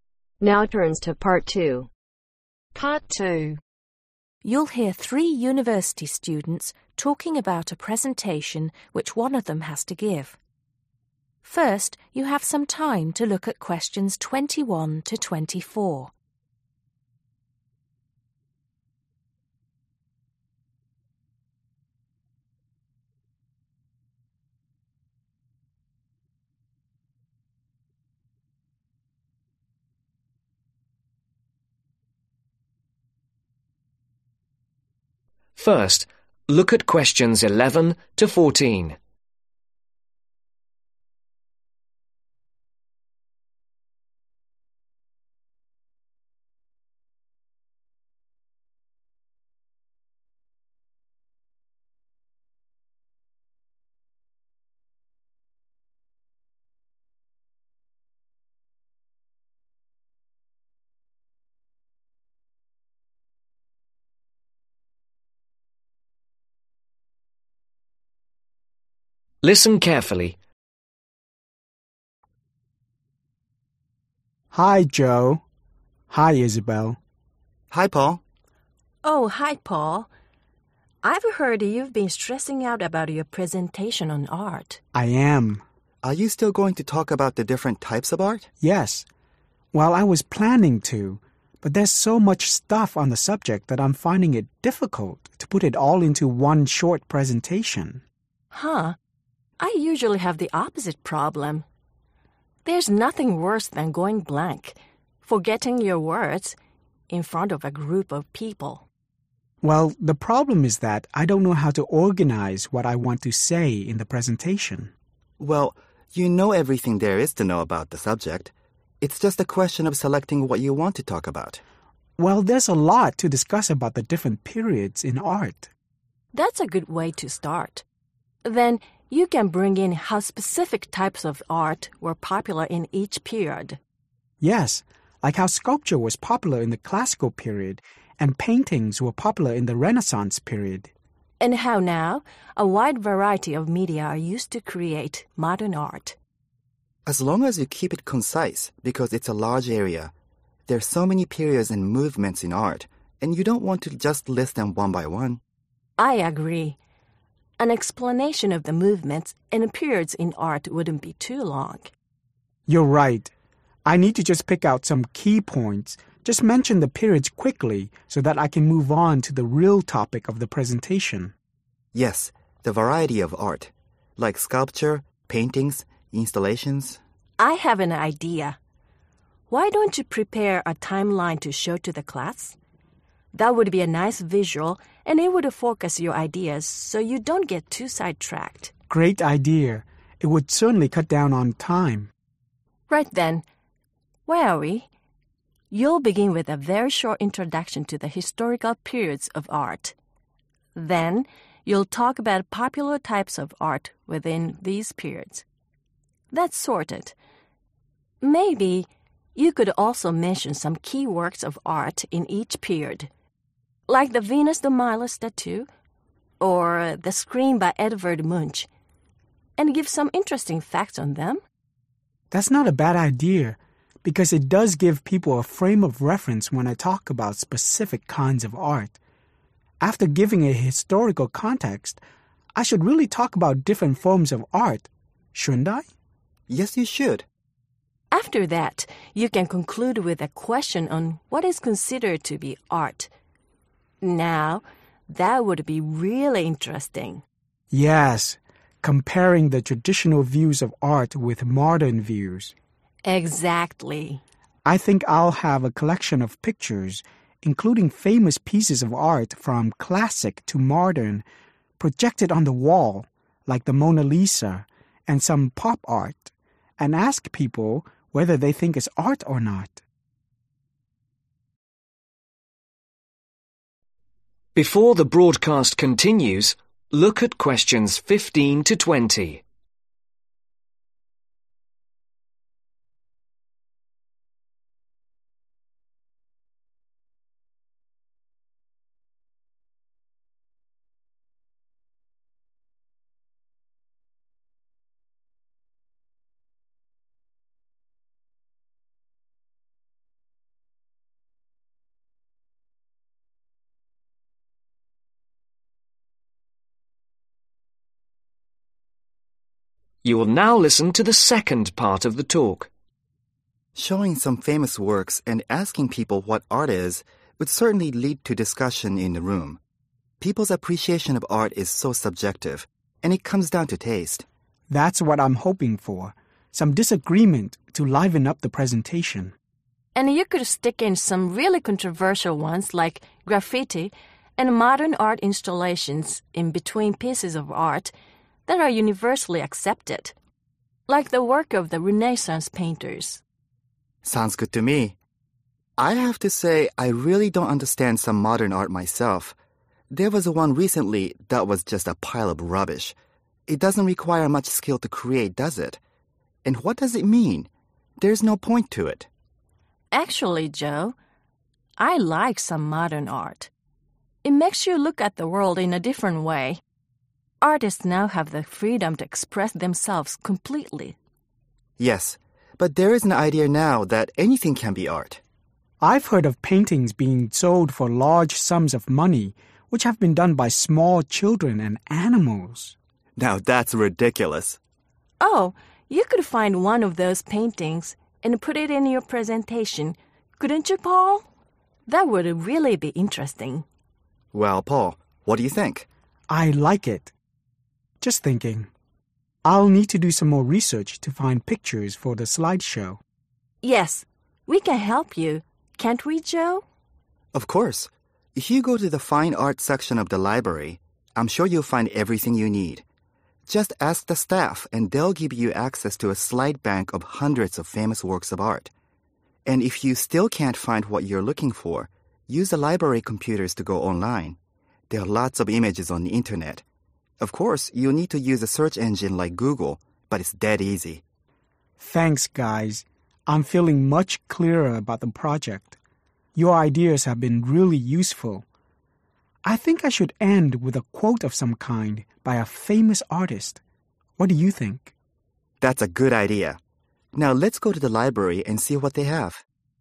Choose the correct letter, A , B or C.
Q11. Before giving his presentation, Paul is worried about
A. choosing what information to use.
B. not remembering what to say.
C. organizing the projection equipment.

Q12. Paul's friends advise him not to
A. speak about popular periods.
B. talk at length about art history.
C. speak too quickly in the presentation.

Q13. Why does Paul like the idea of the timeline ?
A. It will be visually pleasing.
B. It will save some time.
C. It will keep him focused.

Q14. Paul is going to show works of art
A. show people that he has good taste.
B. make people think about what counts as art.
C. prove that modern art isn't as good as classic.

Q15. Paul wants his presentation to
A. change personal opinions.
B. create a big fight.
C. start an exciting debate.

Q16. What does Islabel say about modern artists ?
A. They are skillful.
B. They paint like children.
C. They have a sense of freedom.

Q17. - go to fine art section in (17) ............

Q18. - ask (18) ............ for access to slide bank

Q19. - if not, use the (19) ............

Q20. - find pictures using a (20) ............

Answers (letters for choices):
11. A
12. B
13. B
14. B
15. C
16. C
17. (the) library
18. (the) staff
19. computers
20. search engine